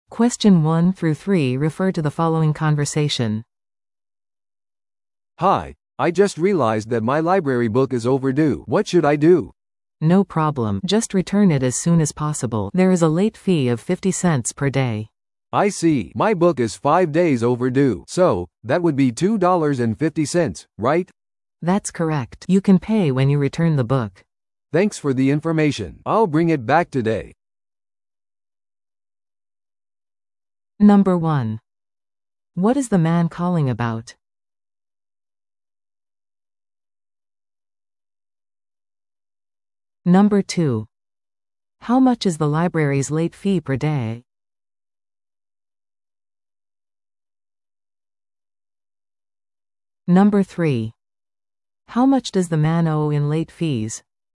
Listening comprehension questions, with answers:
Listen to the audio below and answer the questions.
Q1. What is the man calling about?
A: C: To check his overdue book

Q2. How much is the library's late fee per day?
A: C: 50 cents

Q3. How much does the man owe in late fees?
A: B: $2.50

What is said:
A: "Hi, I just realized that my library book is overdue. What should I do?"
B: "No problem. Just return it as soon as possible. There is a late fee of 50 cents per day."
A: "I see. My book is five days overdue. So, that would be $2.50, right?"
B: "That's correct. You can pay when you return the book."
A: "Thanks for the information. I'll bring it back today."